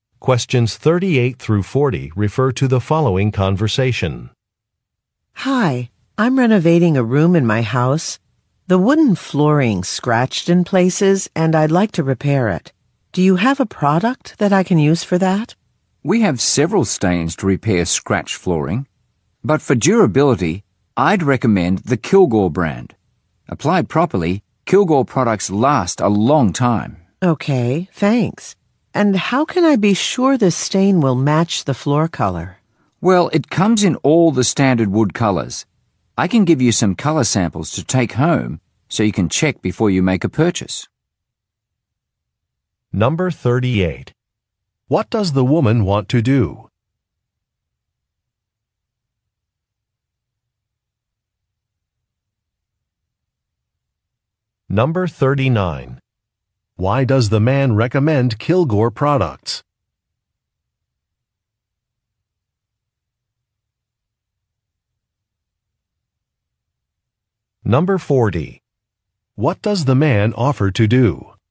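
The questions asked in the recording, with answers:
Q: What does the woman want to do?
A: Repair a scratched wooden floor

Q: Why does the man recommend Kilgore products?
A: They are durable and last a long time

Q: What does the man offer to do?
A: Give her color samples to take home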